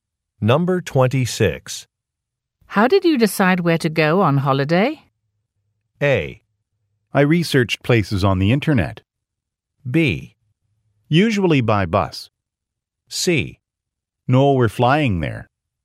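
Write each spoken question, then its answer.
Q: How did you decide where to go on holiday?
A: A: I researched places on the internet.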